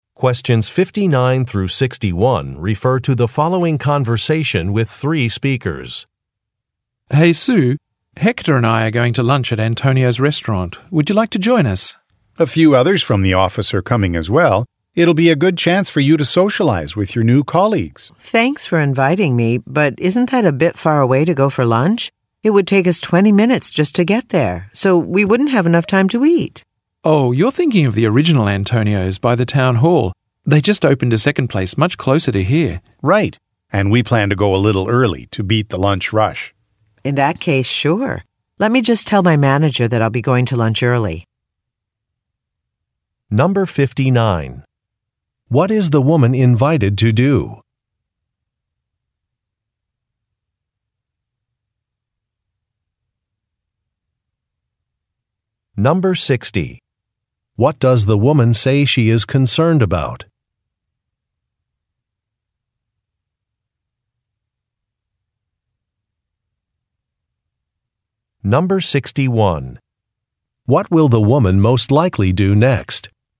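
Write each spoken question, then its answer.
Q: What is the woman invited to do?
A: Have lunch with colleagues at Antonio's restaurant

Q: What does the woman say she is concerned about?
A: The restaurant is too far away to get there and eat in time

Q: What will the woman most likely do next?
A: Tell her manager she is going to lunch early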